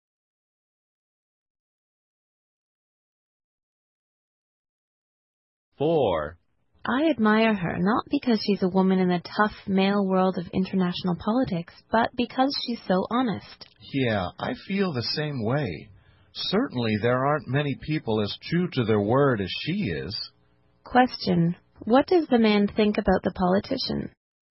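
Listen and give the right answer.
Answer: She is very honest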